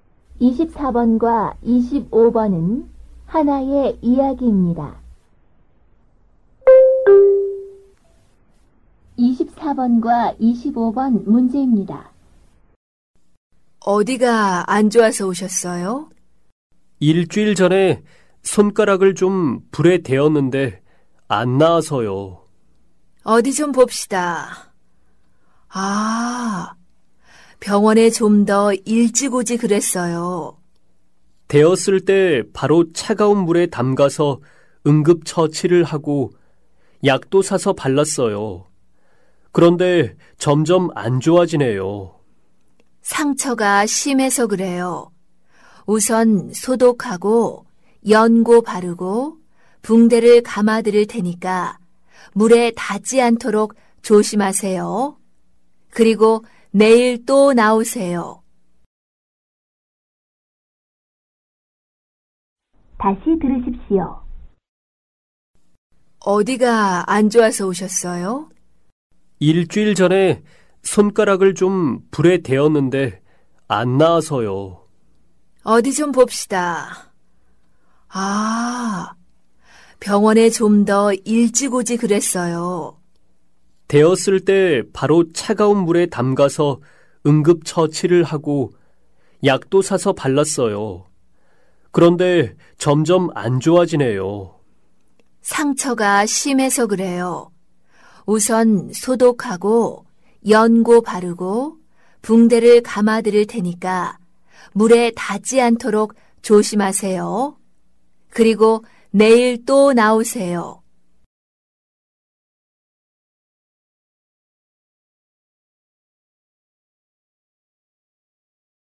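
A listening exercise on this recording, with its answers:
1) 남자는 어디를 다쳤습니까?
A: 손가락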